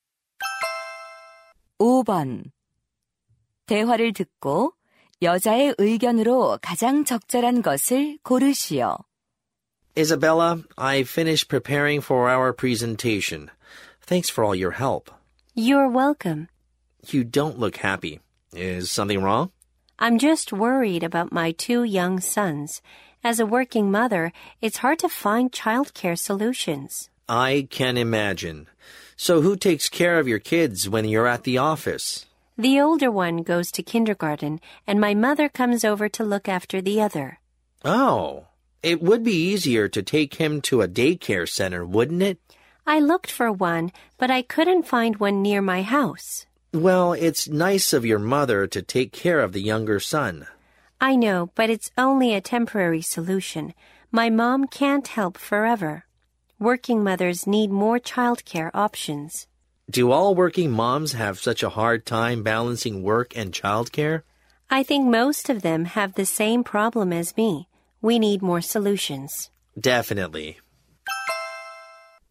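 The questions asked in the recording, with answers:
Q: 대화를 듣고 여자의 의견으로 가장 적절한 것을 고르시오.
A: 직장인 엄마들을 위한 보육 방안이 더 필요하다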